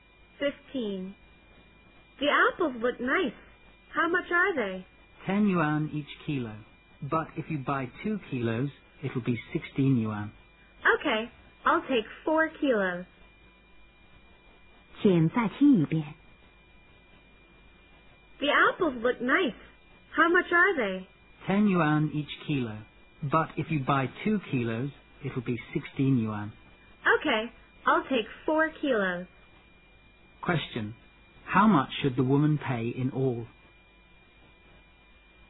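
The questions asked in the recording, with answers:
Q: How much should the woman pay in all?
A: 32 yuan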